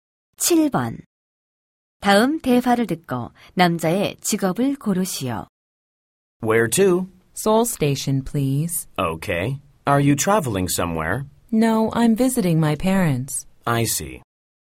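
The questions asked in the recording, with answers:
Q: 다음 대화를 듣고 남자의 직업을 고르시오.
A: 택시 기사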